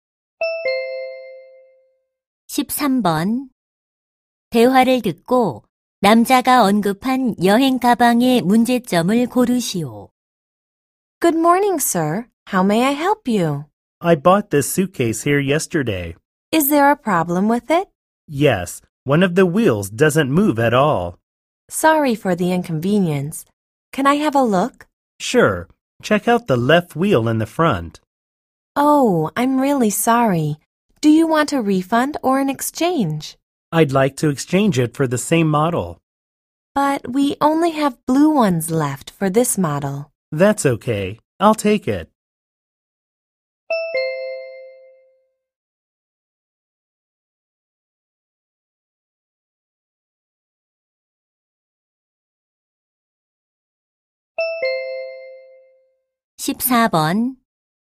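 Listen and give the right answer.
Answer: 바퀴 하나가 움직이지 않는다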